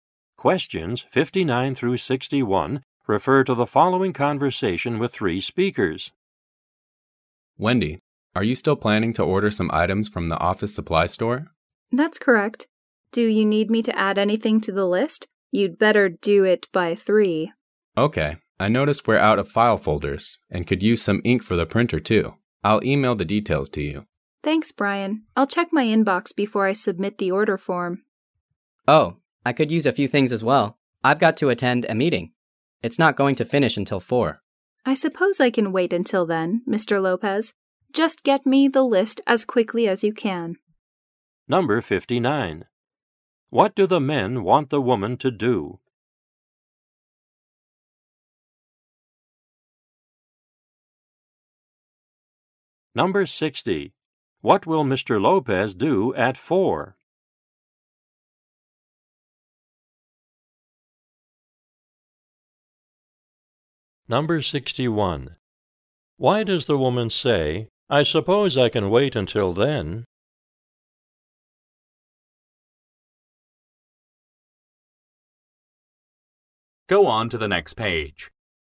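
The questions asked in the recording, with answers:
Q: What do the men want the woman to do?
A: Add items to the office supply order

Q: Why does the woman say, "I suppose I can wait until then"?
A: She agrees to delay the order until Mr. Lopez sends his list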